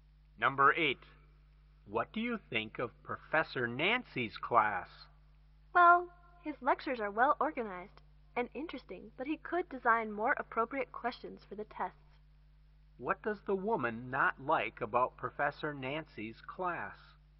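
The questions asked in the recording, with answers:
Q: What does the woman not like about Professor Nancy's class?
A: The test questions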